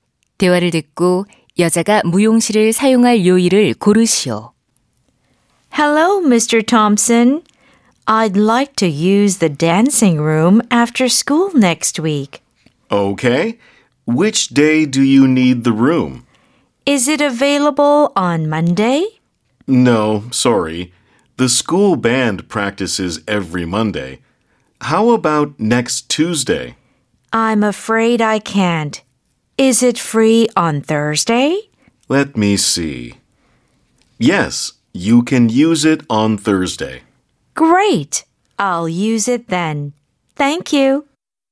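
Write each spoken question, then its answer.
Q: 대화를 듣고 여자가 무용실을 사용할 요일을 고르시오.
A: 목요일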